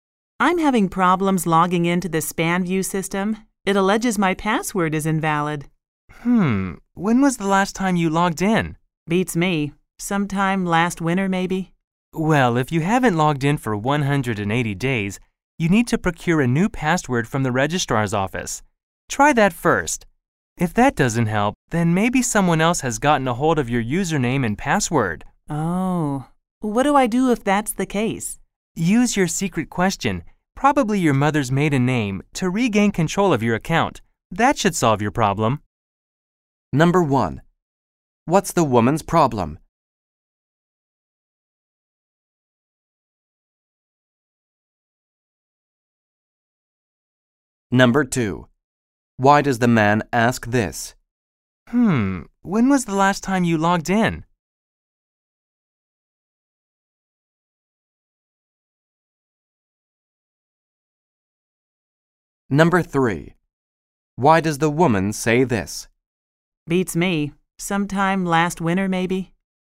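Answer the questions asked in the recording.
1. She can't log into the SpanView system; it says her password is invalid.
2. To find out whether her password expired because she hadn't logged in for 180 days.
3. She doesn't remember exactly when she last logged in.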